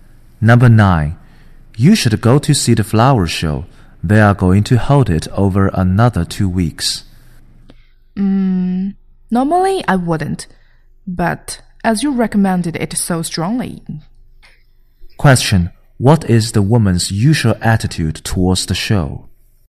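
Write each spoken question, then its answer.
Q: What is the woman's usual attitude towards the show?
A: She usually wouldn't go; she's not interested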